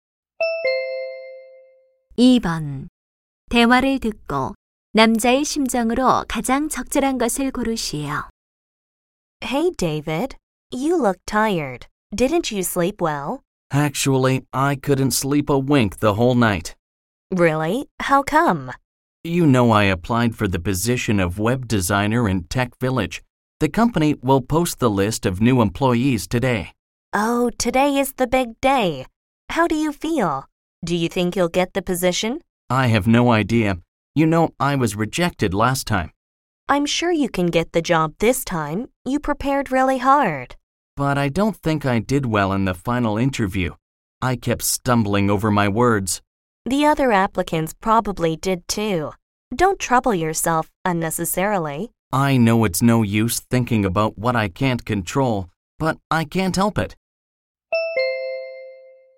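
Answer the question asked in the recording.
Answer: 불안하고 초조함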